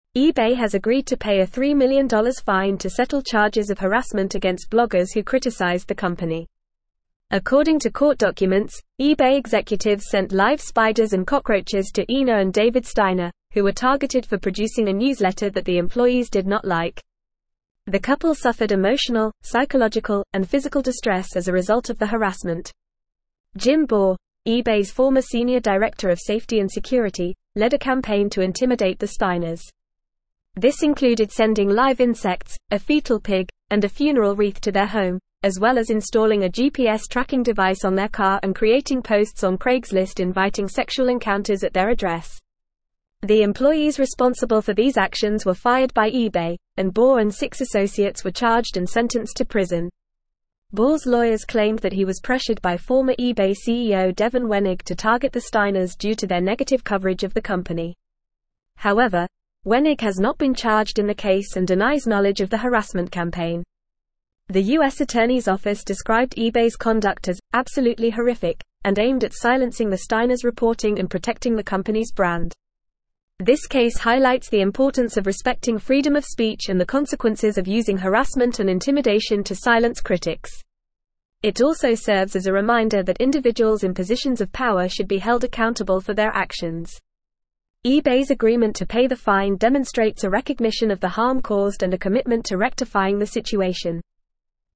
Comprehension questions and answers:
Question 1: eBay has agreed to pay a $3 million fine to settle (1)______ of harassment against (2)______ who criticized the company.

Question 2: eBay has agreed to pay a $3 million fine to settle (1)______ of harassment against (2)______ who criticized the company.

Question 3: who were (3)______ for producing a newsletter that the employees did not like.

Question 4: The couple suffered emotional, psychological, and physical distress as a (4)______ of the harassment.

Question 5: Jim Baugh, eBay's former senior (5)______ of safety and (6)______, led a campaign to intimidate the Steiners.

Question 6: Jim Baugh, eBay's former senior (5)______ of safety and (6)______, led a campaign to intimidate the Steiners.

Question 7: creating posts on Craigslist inviting sexual (7)______ at their address.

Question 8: The employees responsible for these (8)______ were fired by eBay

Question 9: to target the (9)______ due to their negative coverage of the company.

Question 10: However, Wenig has not been charged in the case and (10)______ knowledge of the (11)______ campaign.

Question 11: However, Wenig has not been charged in the case and (10)______ knowledge of the (11)______ campaign.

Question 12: The US Attorney's Office (12)______ eBay's conduct as "absolutely horrific"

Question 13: It also serves as a reminder that individuals in (13)______ of (14)______ should be held (15)______ for their actions.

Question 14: It also serves as a reminder that individuals in (13)______ of (14)______ should be held (15)______ for their actions.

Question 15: It also serves as a reminder that individuals in (13)______ of (14)______ should be held (15)______ for their actions.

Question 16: eBay's agreement to pay the fine demonstrates a recognition of the harm (16)______ and a commitment to rectifying the situation.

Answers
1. charges
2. bloggers
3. targeted
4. result
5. director
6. security
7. encounters
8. actions
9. Steiners
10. denies
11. harassment
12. described
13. positions
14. power
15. accountable
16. caused

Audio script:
eBay has agreed to pay a $3 million fine to settle charges of harassment against bloggers who criticized the company. According to court documents, eBay executives sent live spiders and cockroaches to Ina and David Steiner, who were targeted for producing a newsletter that the employees did not like. The couple suffered emotional, psychological, and physical distress as a result of the harassment.
Jim Baugh, eBay's former senior director of safety and security, led a campaign to intimidate the Steiners. This included sending live insects, a foetal pig, and a funeral wreath to their home, as well as installing a GPS tracking device on their car and creating posts on Craigslist inviting sexual encounters at their address. The employees responsible for these actions were fired by eBay, and Baugh and six associates were charged and sentenced to prison.
Baugh's lawyers claimed that he was pressured by former eBay CEO Devin Wenig to target the Steiners due to their negative coverage of the company. However, Wenig has not been charged in the case and denies knowledge of the harassment campaign. The US Attorney's Office described eBay's conduct as "absolutely horrific" and aimed at silencing the Steiners' reporting and protecting the company's brand.
This case highlights the importance of respecting freedom of speech and the consequences of using harassment and intimidation to silence critics. It also serves as a reminder that individuals in positions of power should be held accountable for their actions. eBay's agreement to pay the fine demonstrates a recognition of the harm caused and a commitment to rectifying the situation.

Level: Level 4